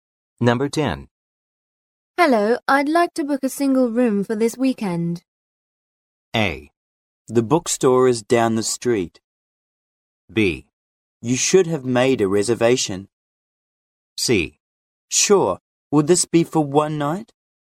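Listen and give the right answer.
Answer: C: Sure, would this be for one night?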